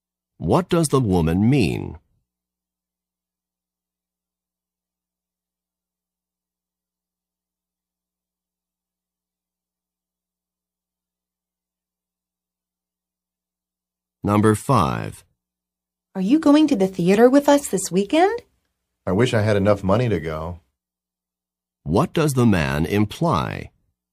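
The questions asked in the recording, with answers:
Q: What does the man imply?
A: He doesn't have enough money, so he won't go.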